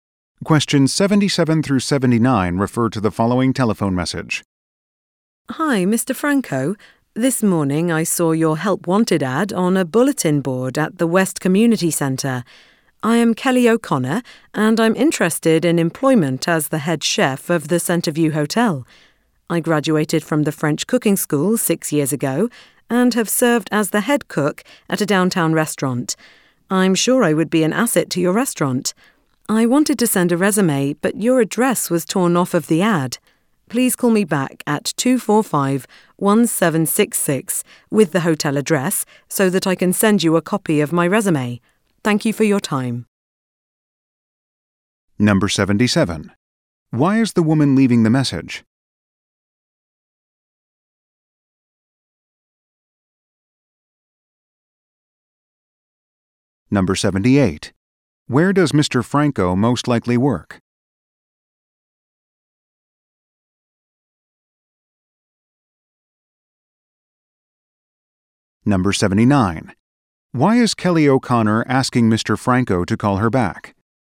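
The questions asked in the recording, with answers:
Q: Why is the woman leaving the message?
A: To apply for the head chef job

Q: Franco most likely work?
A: At the Centreview Hotel

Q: Why is Kelly O'Connor asking Mr.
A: To get the hotel address so she can send her resume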